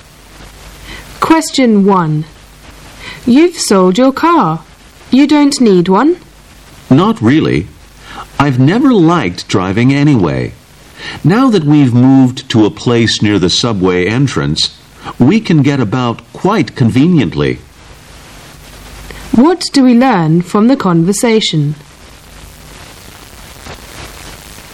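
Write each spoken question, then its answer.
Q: What do we learn from the conversation?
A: The speaker sold the car because they now live near a subway entrance and can get around easily.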